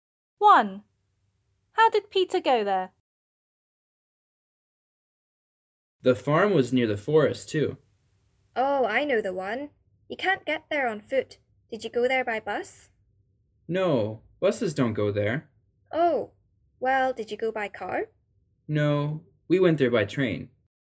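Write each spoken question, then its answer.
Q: How did Peter go there?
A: By train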